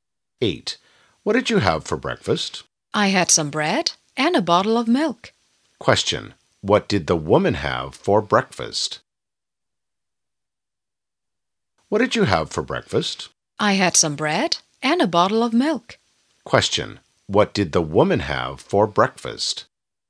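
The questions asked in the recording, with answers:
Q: What did the woman have for breakfast?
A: Some bread and a bottle of milk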